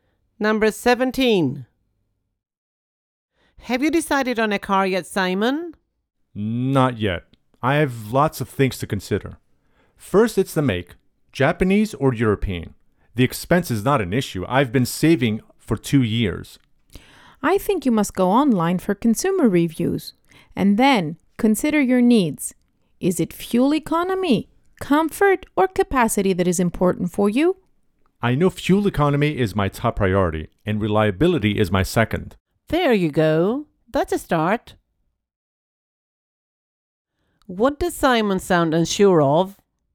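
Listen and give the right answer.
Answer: The make of the car (Japanese or European)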